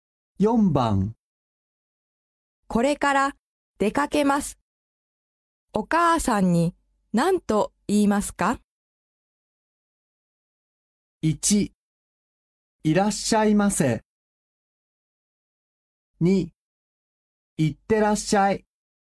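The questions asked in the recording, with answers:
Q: これから出かけます。お母さんに何と言いますか?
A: 3: 行ってきます。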